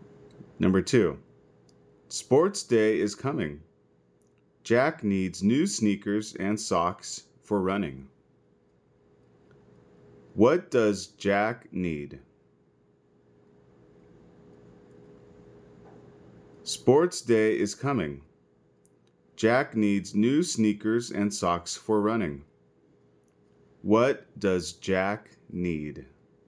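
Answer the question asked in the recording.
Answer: New sneakers and socks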